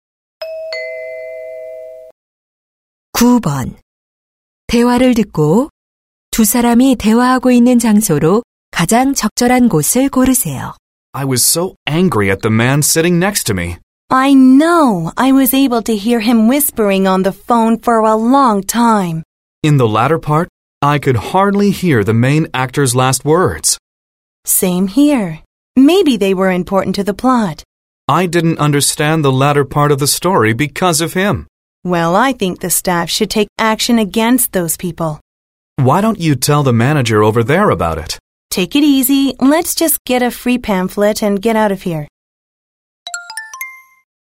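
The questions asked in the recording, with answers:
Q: 대화를 듣고 두 사람이 대화하고 있는 장소로 가장 적절한 곳을 고르세요.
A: 극장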